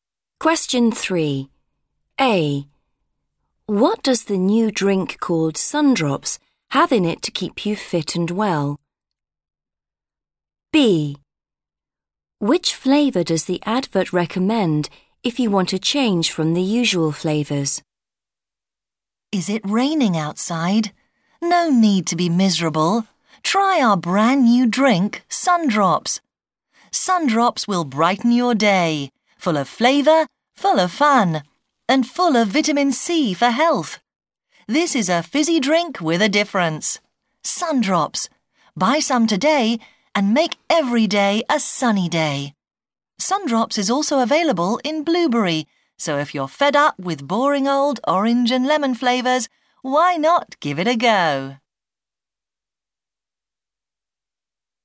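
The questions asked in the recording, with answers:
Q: What does the new drink called Sundrops have in it to keep you fit and well?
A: vitamin C

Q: Which flavour does the advert recommend if you want a change from the usual flavours?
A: blueberry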